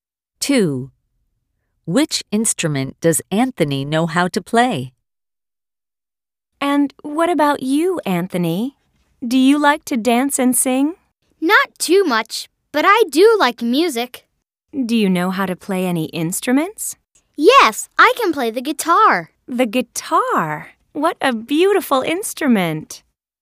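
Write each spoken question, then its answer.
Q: Which instrument does Anthony know how to play?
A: the guitar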